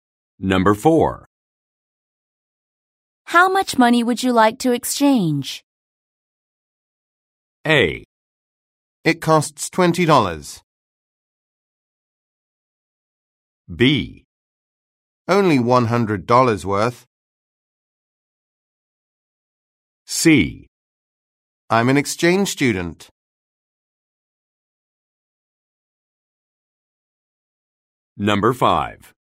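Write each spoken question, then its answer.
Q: How much money would you like to exchange?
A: B: Only $100 worth.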